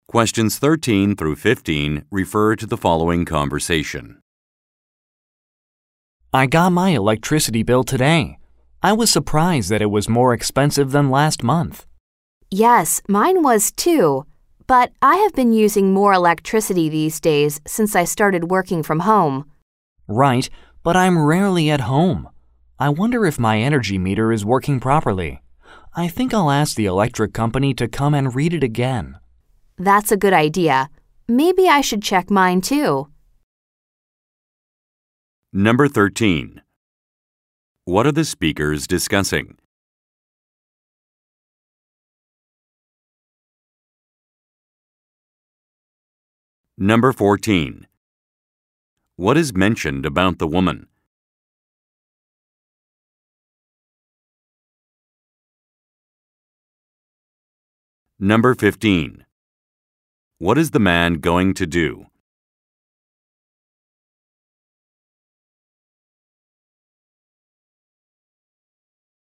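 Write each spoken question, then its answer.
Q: What are the speakers discussing?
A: Their electricity bills being higher than last month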